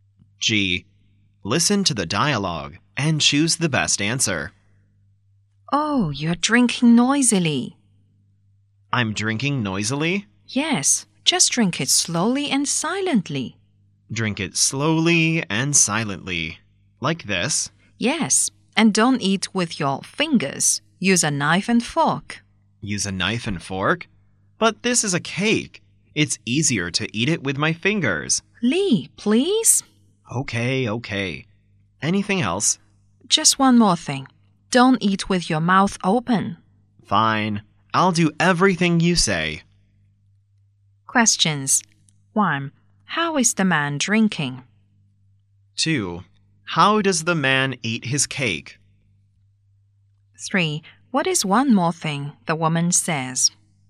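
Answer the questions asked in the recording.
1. Noisily
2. With his fingers
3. Don't eat with your mouth open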